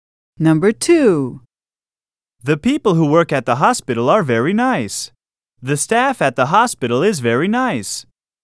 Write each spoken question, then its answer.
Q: The people who work at the hospital are very nice. The staff at the hospital is very nice.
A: Same is the correct answer.